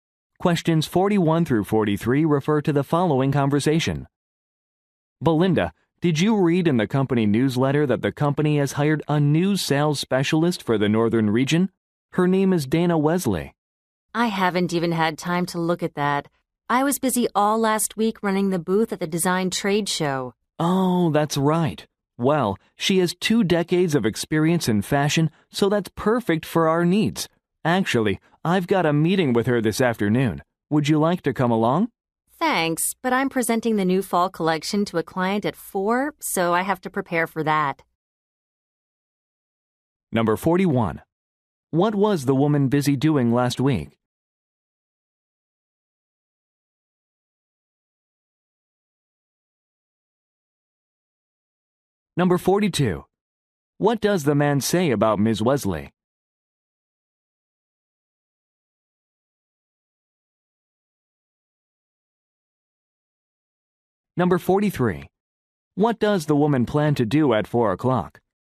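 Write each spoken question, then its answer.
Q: What was the woman busy doing last week?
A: Running a booth at a design trade show

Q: What does the man say about Ms. Wesley?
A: She has two decades of experience in fashion

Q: What does the woman plan to do at 4 o'clock?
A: Present the new fall collection to a client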